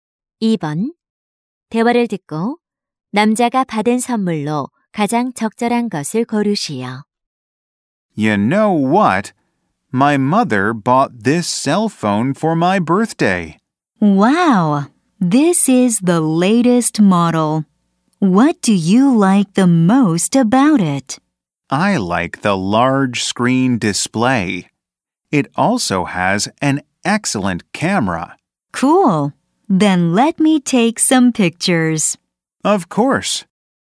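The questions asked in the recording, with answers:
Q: 대화를 듣고 남자가 받은 선물로 가장 적절한 것을 고르시오.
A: 휴대 전화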